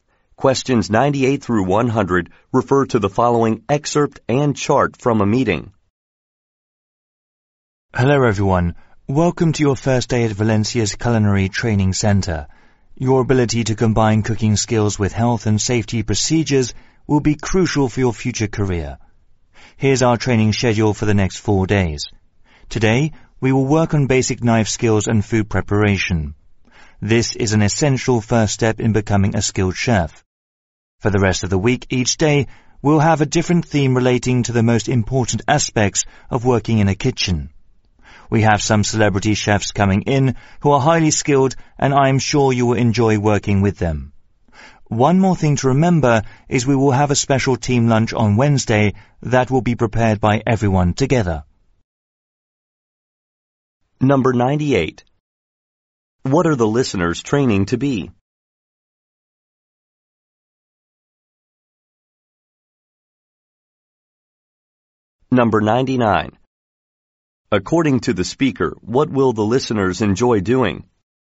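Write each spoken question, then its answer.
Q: What are the listeners training to be?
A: Chefs

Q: According to the speaker, what will the listeners enjoy doing?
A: Working with celebrity chefs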